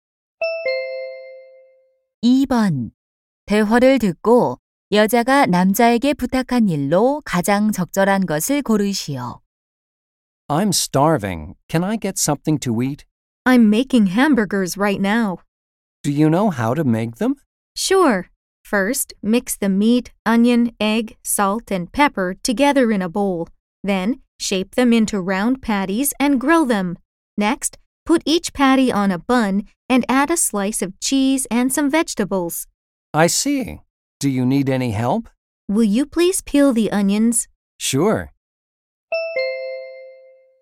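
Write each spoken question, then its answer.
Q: 대화를 듣고 여자가 남자에게 부탁한 일로 가장 적절한 것을 고르시오.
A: 양파 껍질 벗기기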